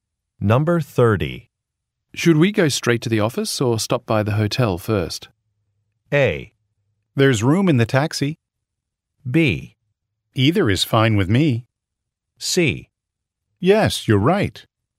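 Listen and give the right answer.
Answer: B: Either is fine with me.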